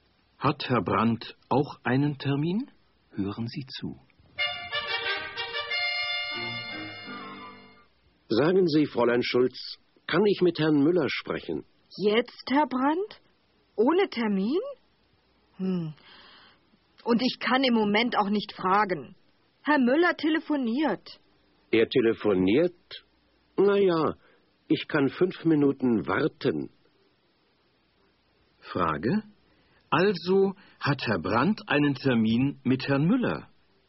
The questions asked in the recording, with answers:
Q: Also hat Herr Brandt einen Termin mit Herrn Müller?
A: Nein, er hat keinen Termin mit ihm.